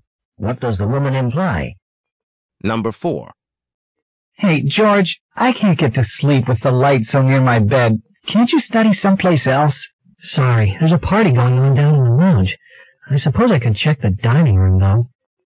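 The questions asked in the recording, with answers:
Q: What will George probably do?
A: Go study in the dining room.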